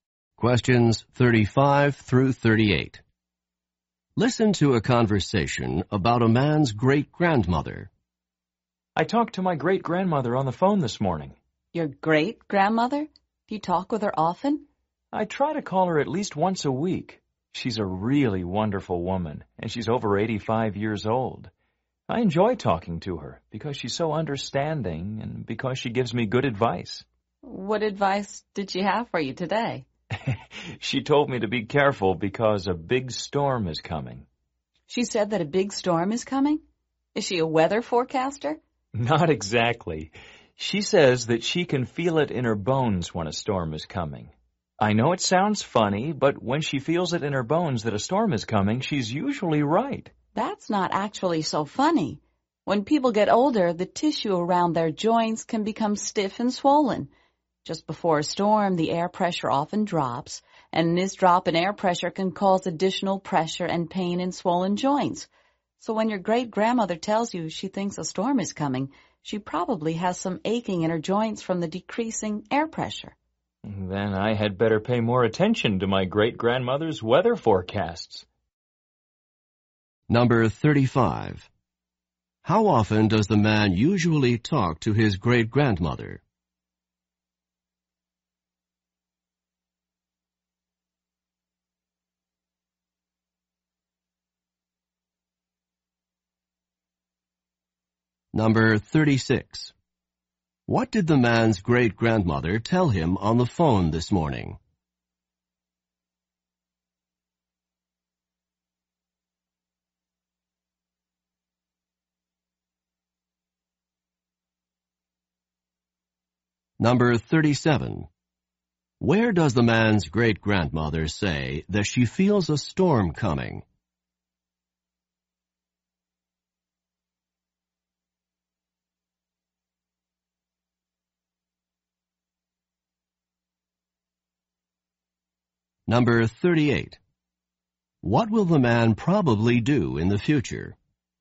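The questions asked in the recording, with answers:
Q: How often does the man usually talk to his great-grandmother?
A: At least once a week

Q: What did the man's great-grandmother tell him on the phone this morning?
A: To be careful because a big storm is coming

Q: Where does the man's great-grandmother say that she feels a storm coming?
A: In her bones

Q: What will the man probably do in the future?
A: Pay more attention to his great-grandmother's weather forecasts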